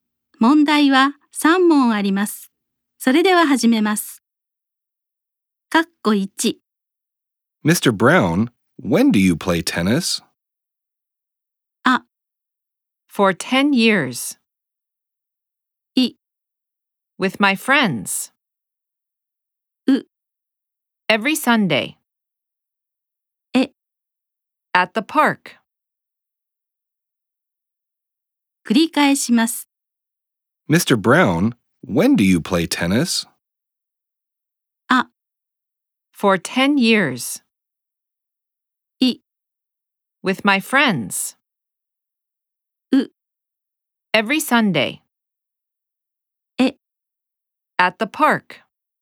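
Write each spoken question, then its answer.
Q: Mr. Brown, when do you play tennis?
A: う: Every Sunday.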